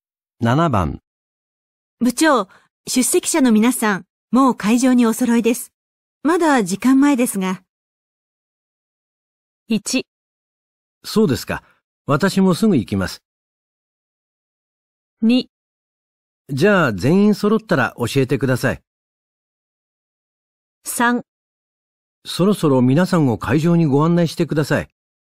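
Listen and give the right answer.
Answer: 1: そうですか。私もすぐ行きます。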